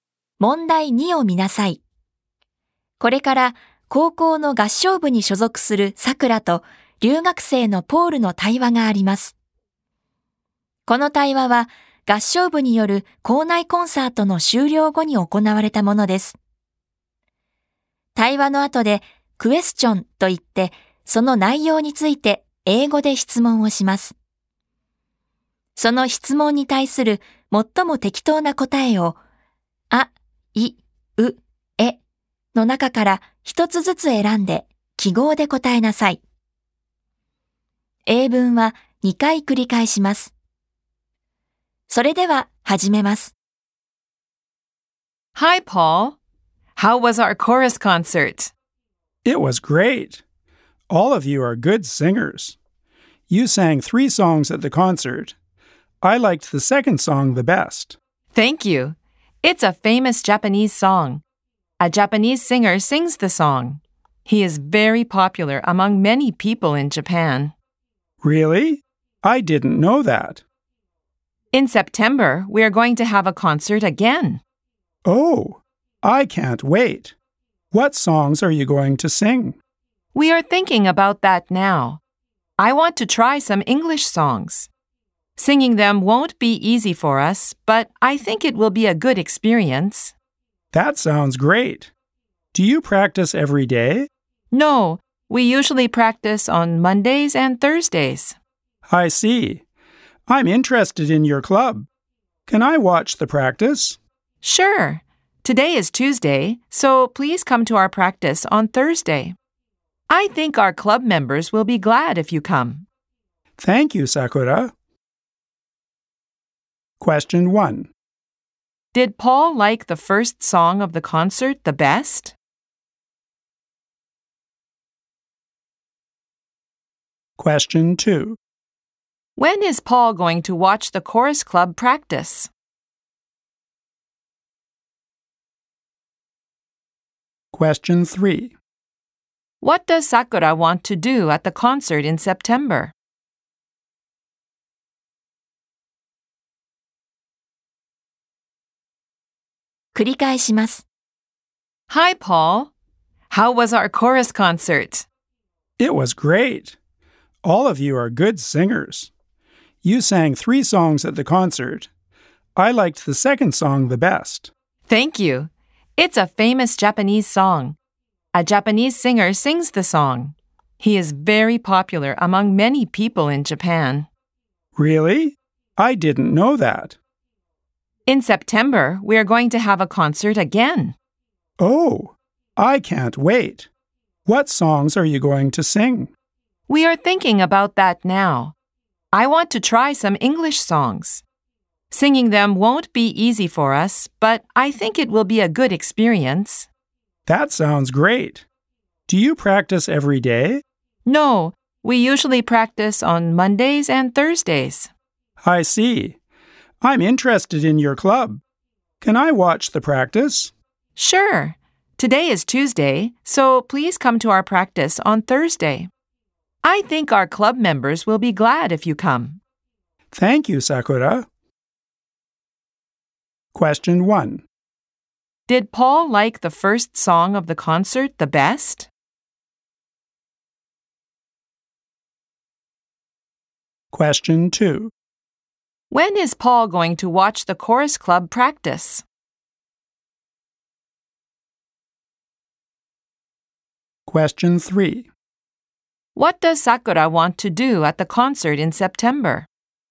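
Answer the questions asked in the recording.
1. No, he didn't. He liked the second song the best.
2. On Thursday.
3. She wants to try some English songs.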